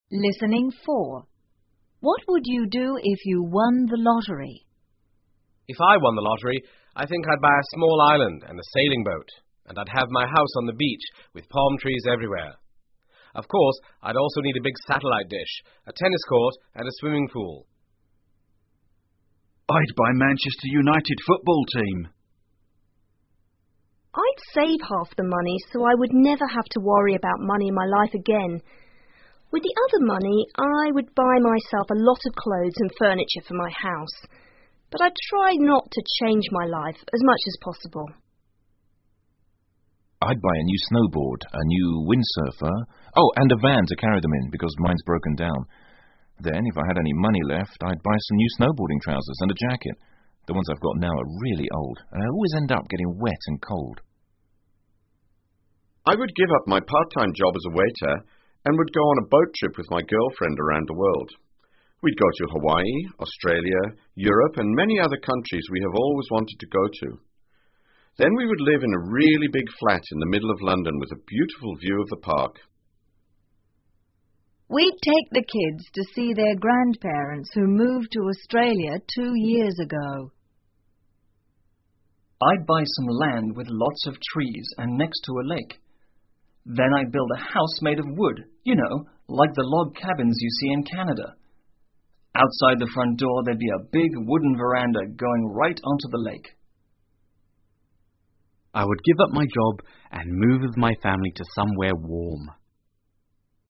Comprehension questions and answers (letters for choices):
请根据独白内容回答问题。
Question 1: Which speakers live with their families?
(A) Speakers 1 and 6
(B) Speakers 4 and 7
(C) Speakers 6 and 8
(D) Speakers 5 ,7 and 8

请根据对话内容,判断下面句子是否正确,如果符合对话内容,请在T做记号,如果不符合,请在F做记号。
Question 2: Speaker 1 would like to live on an island.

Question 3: Speaker 2 would like to change her life.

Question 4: Speaker 5 would like to give up his job.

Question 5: Speaker 6 would like to move to Australia.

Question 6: Speaker 7 would like to move somewhere warm.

请根据独白内容回答问题。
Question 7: Which speaker would like to buy a football team?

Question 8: Which speaker loves action sports?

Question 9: Where would Speaker 5 like to live?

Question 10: Which speaker would like to build his/her own house?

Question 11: Where would he/she want to build the house?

下面是独白部分的内容, 请再听一次对话,在空格内填入遗漏的部分。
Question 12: I'd buy a new snowboard, a new ____________...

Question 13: mine's ___________________.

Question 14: I'd buy some new snowboarding trousers and a _____________.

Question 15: Then we would live in a really big flat in the middle of London with a _________of the park.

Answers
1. C
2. T
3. F
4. T
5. F
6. F
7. Speaker 2
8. Speaker 4
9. London/In a flat
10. Speaker 7
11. Next to a lake
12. Windsurfer
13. broken dowm
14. jacket
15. beautiful view

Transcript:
Speaker 1:If I won the lottery,I think I'd buy a small island and a sailing boat.And I'd have my house on the beach with palm trees everywhere.Of course,I'd also need a big satellite dish,a tennis court and a swimming pool.
Speaker 2:I'd buy Manchester United football team.
Speaker 3:I'd save half the money so I would never have to worry about money in my life again.With the other money I would buy myself a lot of clothes and furniture for my house.But I'd try not tochange my life as much as possible.
Speaker 4:I'd buy a new snowboard,a new windsurfer...Oh and a van to carry them in,because mine's broken down.Then,if I had any money left,I'd buy some new snowboarding trousers and a jacket.The onesI've got now are really old,and I always end up getting wet and cold.
Speaker 5:I would give up my part-time job as a waiter and would go on a boat trip with my girlfriend around the world.We'd go to Hawaii,Australia,Europe and many other counties we have always wanted to go to.Then we would live in a really big flat in the middle of London with a beautiful view of the park.
Speaker 6:We'd take the kids to see their grandparents who moved to Australia two years ago.
Speaker 7:I'd buy some lands with lots of trees and next to a lake.Then I'd build a house made of wood,you know,like the log cabins you see in Canada.Outside the front floor there'd be a big wooden veranda going about right onto the lake.
Speaker 8: I would give up my job and move with my family to somewhere warm.!